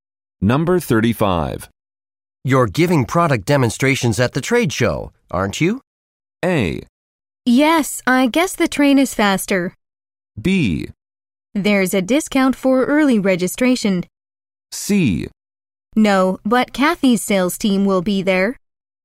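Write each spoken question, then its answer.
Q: You're giving product demonstrations at the trade show, aren't you?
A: C: No, but Kathy's sales team will be there.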